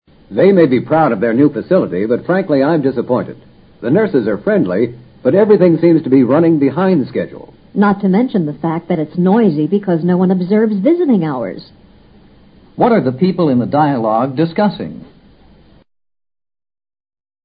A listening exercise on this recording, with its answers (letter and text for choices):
What are the people in the dialogue discussing?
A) A new restaurant.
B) A new hotel.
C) A new hospital.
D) A new airport.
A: C) A new hospital.

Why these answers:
答案是根据对话中nurses, visiting hours提供的信息做出的推断。在另外三种场所极不可能涉及nurses或visiting hours。 new facility :新设施,这里指的是医院。 frankly: 坦率地。 run behind schedule: (各项工作均)未能按原计划进行。 observe visiting hours: 遵守探视时间。

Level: 世博高级听说